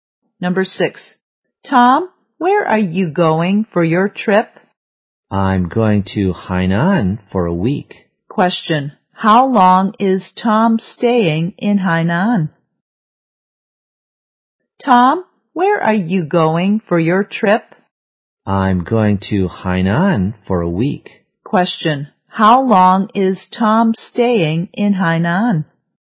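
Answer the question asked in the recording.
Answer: For a week.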